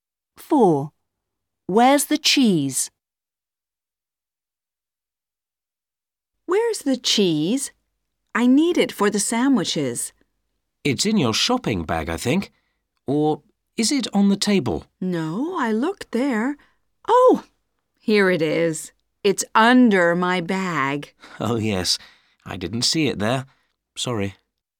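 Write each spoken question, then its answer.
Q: Where's the cheese?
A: Under the bag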